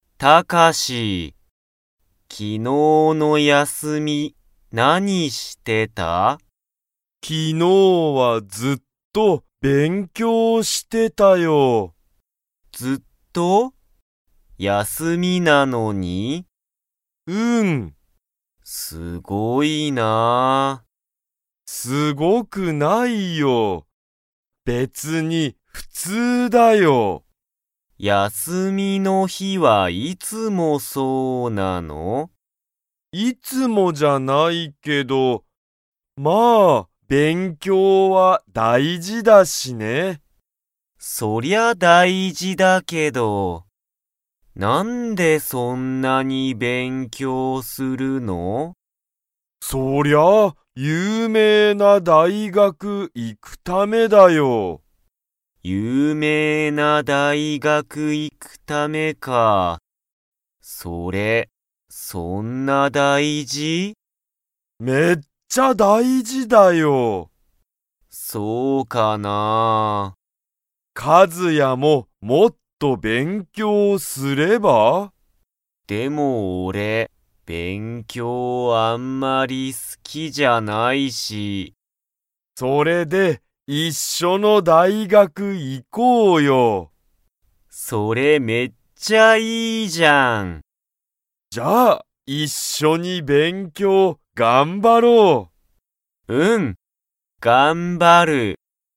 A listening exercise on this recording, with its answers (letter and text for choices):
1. タカシは、____大学(だいがく)に行(い)くため、勉強(べんきょう)する。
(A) 有名(ゆうめい)な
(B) 大変(たいへん)な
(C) 普通(ふつう)の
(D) 大事(だいじ)な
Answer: (A) 有名(ゆうめい)な

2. カズヤは、勉強(べんきょう)が好(す)きですか?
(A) はい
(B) いいえ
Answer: (B) いいえ

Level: Level 2